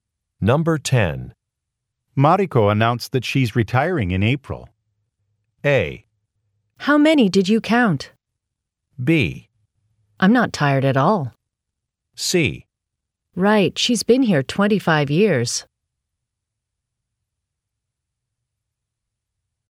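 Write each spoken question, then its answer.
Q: Mariko announced that she's retiring in April.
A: C: Right, she's been here 25 years.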